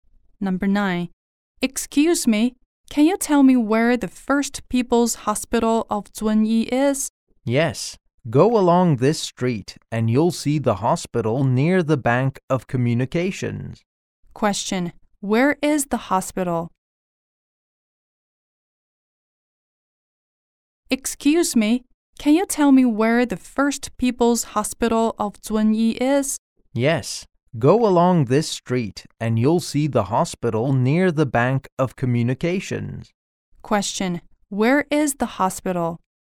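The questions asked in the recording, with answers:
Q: Question: Where is the hospital?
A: Near the Bank of Communications.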